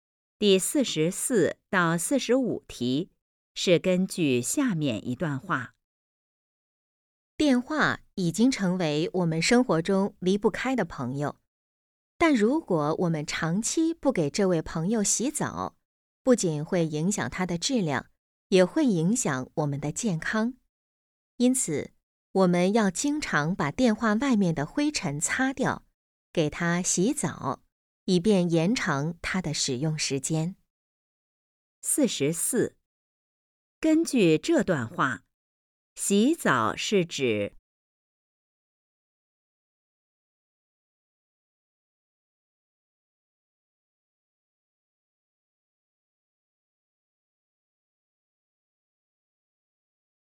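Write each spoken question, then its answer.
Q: 根据这段话,洗澡是指?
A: 把电话外面的灰尘擦掉

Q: 这段话主要在谈什么问题?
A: 要经常清洁电话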